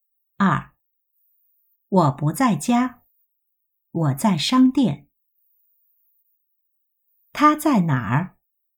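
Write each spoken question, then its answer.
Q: 他在哪儿?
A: 商店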